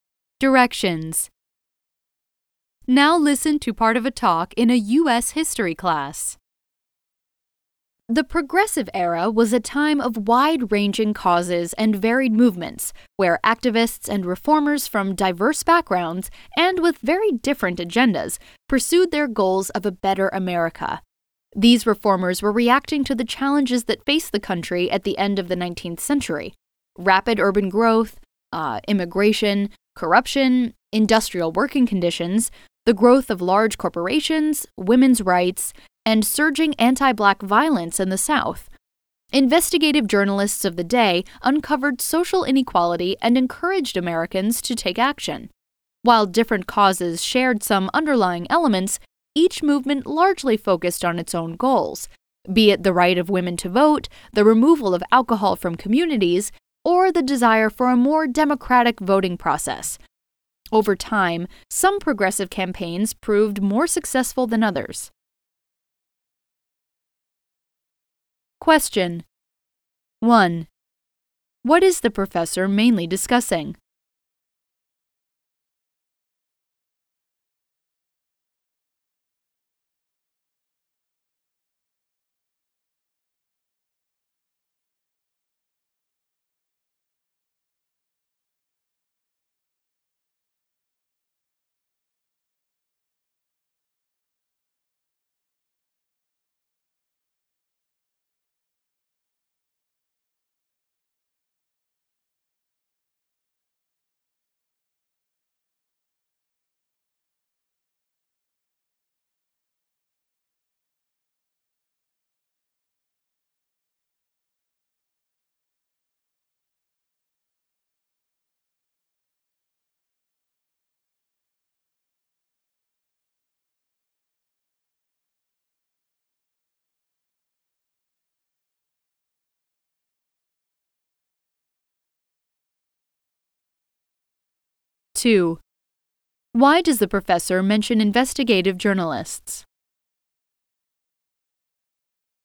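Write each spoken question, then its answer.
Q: What is the professor mainly discussing?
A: The Progressive Era and its varied reform movements

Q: Why does the professor mention investigative journalists?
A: They exposed social inequality and encouraged Americans to take action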